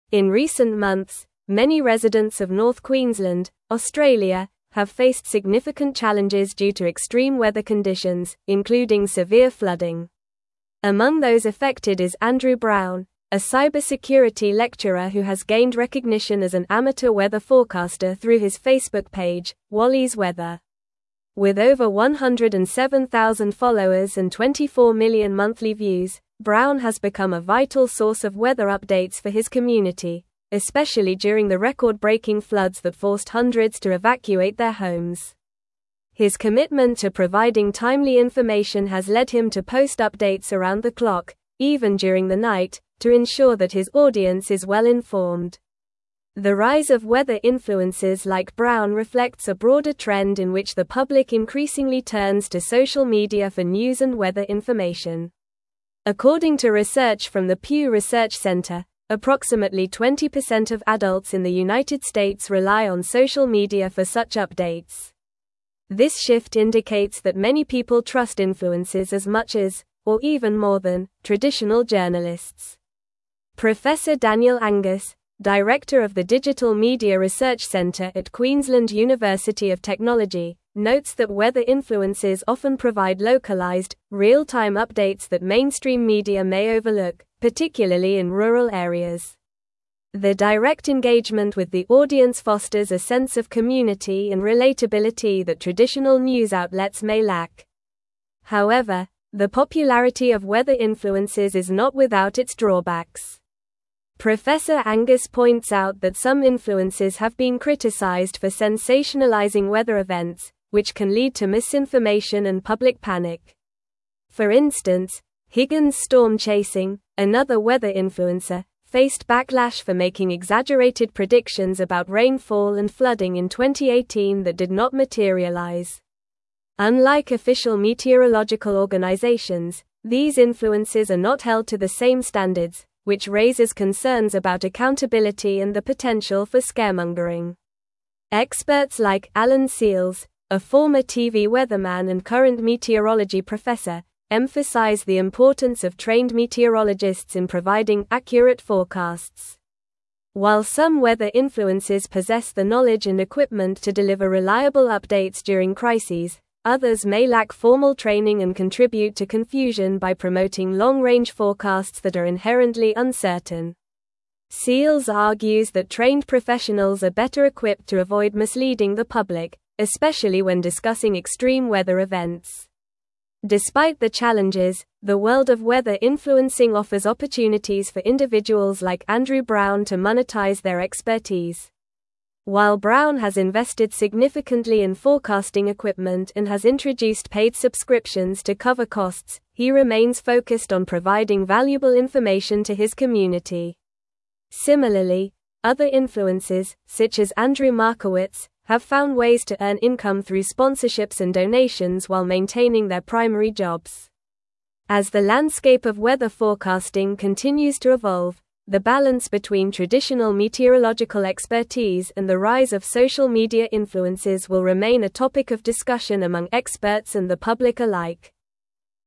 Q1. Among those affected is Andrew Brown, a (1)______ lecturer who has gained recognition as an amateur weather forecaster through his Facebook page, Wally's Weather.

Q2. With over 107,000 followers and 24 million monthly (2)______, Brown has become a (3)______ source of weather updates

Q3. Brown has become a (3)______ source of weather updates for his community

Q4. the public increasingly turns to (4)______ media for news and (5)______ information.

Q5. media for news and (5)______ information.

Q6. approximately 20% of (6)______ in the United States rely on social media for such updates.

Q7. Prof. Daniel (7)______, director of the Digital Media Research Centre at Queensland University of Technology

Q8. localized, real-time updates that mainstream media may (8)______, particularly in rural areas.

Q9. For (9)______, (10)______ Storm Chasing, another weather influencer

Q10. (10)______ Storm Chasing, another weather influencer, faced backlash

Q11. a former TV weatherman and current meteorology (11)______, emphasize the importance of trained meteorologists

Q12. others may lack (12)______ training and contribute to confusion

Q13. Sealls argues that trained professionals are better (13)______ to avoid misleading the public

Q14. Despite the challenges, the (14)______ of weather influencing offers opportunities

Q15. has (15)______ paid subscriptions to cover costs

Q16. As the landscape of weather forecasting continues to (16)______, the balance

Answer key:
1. cybersecurity
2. views
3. vital
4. social
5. weather
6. adults
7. Angus
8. overlook
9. instance
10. Higgins
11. professor
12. formal
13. equipped
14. world
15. introduced
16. evolve

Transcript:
In recent months, many residents of North Queensland, Australia, have faced significant challenges due to extreme weather conditions, including severe flooding. Among those affected is Andrew Brown, a cybersecurity lecturer who has gained recognition as an amateur weather forecaster through his Facebook page, Wally's Weather. With over 107,000 followers and 24 million monthly views, Brown has become a vital source of weather updates for his community, especially during the record-breaking floods that forced hundreds to evacuate their homes. His commitment to providing timely information has led him to post updates around the clock, even during the night, to ensure that his audience is well-informed.
The rise of weather influencers like Brown reflects a broader trend in which the public increasingly turns to social media for news and weather information. According to research from the Pew Research Centre, approximately 20% of adults in the United States rely on social media for such updates. This shift indicates that many people trust influencers as much as, or even more than, traditional journalists. Daniel Angus, director of the Digital Media Research Centre at Queensland University of Technology, notes that weather influencers often provide localized, real-time updates that mainstream media may overlook, particularly in rural areas. Their direct engagement with the audience fosters a sense of community and relatability that traditional news outlets may lack.
However, the popularity of weather influencers is not without its drawbacks. Angus points out that some influencers have been criticized for sensationalizing weather events, which can lead to misinformation and public panic. For instance, Higgins Storm Chasing, another weather influencer, faced backlash for making exaggerated predictions about rainfall and flooding in 2018 that did not materialize. Unlike official meteorological organizations, these influencers are not held to the same standards, which raises concerns about accountability and the potential for scaremongering.
Experts like Alan Sealls, a former TV weatherman and current meteorology professor, emphasize the importance of trained meteorologists in providing accurate forecasts. While some weather influencers possess the knowledge and equipment to deliver reliable updates during crises, others may lack formal training and contribute to confusion by promoting long-range forecasts that are inherently uncertain. Sealls argues that trained professionals are better equipped to avoid misleading the public, especially when discussing extreme weather events.
Despite the challenges, the world of weather influencing offers opportunities for individuals like Andrew Brown to monetize their expertise. While Brown has invested significantly in forecasting equipment and has introduced paid subscriptions to cover costs, he remains focused on providing valuable information to his community. Similarly, other influencers, such as Andrew Markowitz, have found ways to earn income through sponsorships and donations while maintaining their primary jobs. As the landscape of weather forecasting continues to evolve, the balance between traditional meteorological expertise and the rise of social media influencers will remain a topic of discussion among experts and the public alike.